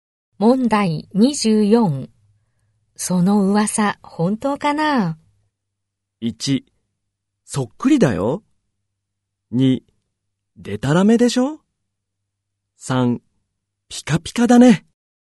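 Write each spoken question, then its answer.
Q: その噂、本当かな?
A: 2: でたらめでしょ?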